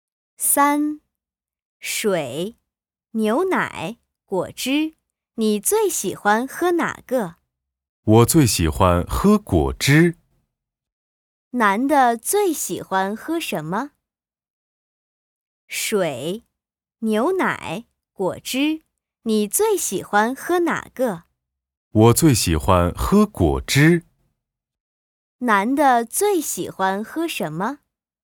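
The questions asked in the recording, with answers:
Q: 男的最喜欢喝什么?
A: 果汁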